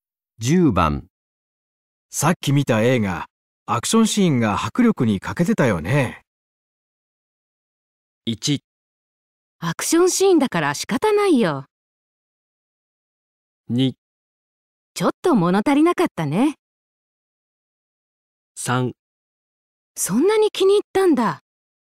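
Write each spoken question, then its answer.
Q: さっき見た映画、アクションシーンが迫力に欠けてたよね。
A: 2: ちょっと物足りなかったね。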